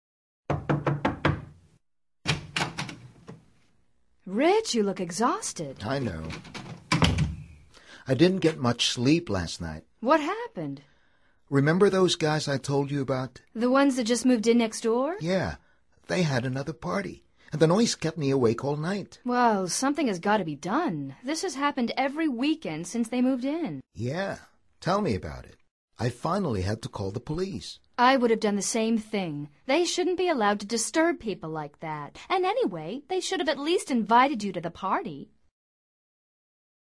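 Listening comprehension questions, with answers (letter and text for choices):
Activity 97: Basándote en los comentarios anteriores, selecciona las opciones más adecuadas para cada oración. Verifica luego las respuestas correctas.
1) Rich looks exhausted because ...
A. he couldn't sleep well today.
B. he didn't get much sleep last night.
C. he had a noisy party.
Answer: B. he didn't get much sleep last night.

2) When did Rich's neighbors moved in?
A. Just moved in.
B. Some time ago.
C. Last night.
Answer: A. Just moved in.

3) How often does this situation happen?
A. Every day.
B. Every night.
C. Every weekend.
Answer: C. Every weekend.

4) Mary says that the neighbors ...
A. should call the police.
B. should have invited him.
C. should be allowed to disturb.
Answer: B. should have invited him.

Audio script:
Rich, you look exhausted!
Rich:
I know. I didn't get much sleep last night.
What happened?
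Rich:
Remember those guys I told you about?
The ones that just moved in next door?
Rich:
Yeah. They had another party, and the noise kept me awake all night.
Well, something has got to be done. This has happened every weekend since they moved in!
Rich:
Yeah. Tell me about it. I finally had to call the police.
I would have done the same thing. They shouldn't be allowed to disturb people like that. And anyway, they should have at least invited you to the party!

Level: Nivel Avanzado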